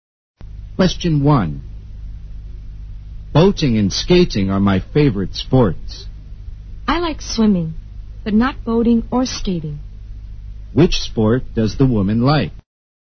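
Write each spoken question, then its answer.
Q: Which sport does the woman like?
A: Swimming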